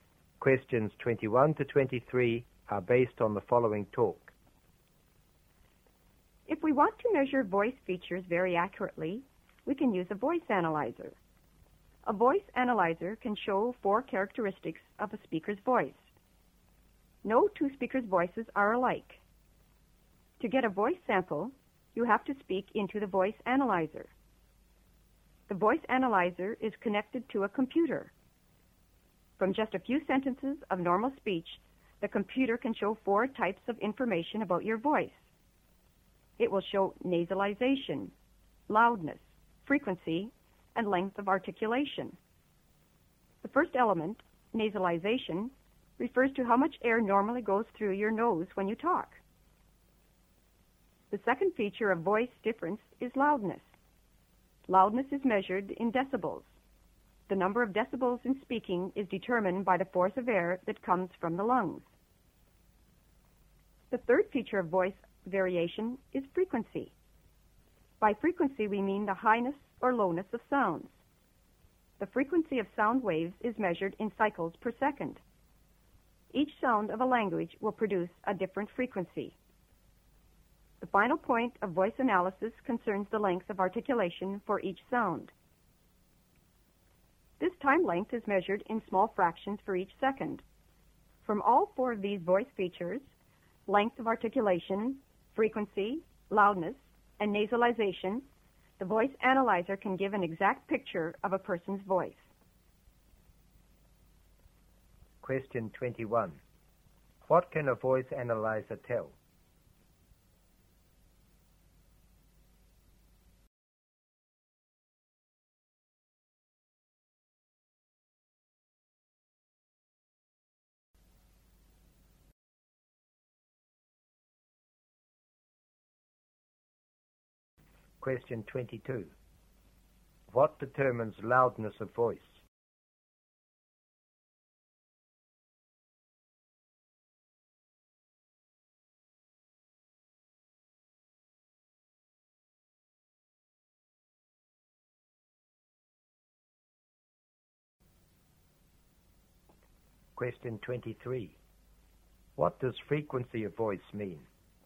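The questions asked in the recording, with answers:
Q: What can a voice analyzer tell?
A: Four features of a voice: nasalization, loudness, frequency and length of articulation

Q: What determines loudness of voice?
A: The force of air coming from the lungs

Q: What does frequency of voice mean?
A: The highness or lowness of sounds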